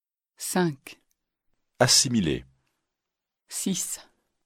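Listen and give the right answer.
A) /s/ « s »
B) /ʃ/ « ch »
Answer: A) /s/ « s »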